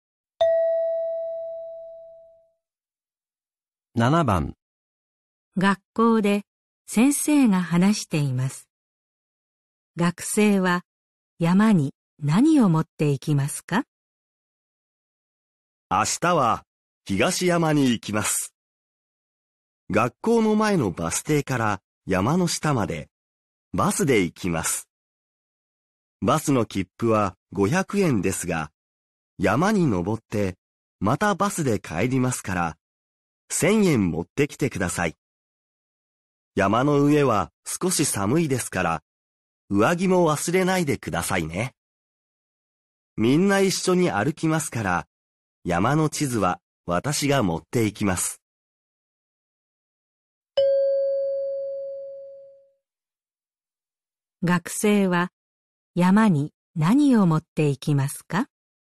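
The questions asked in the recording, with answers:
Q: 学生は山に何を持っていきますか?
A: 1000円と上着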